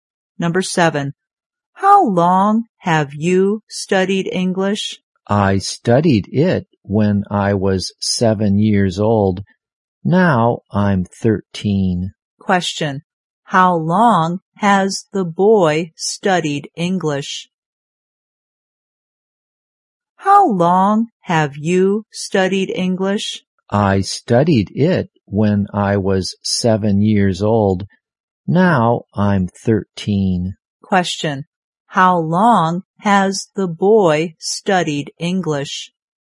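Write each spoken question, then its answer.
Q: How long has the boy studied English?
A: For 6 years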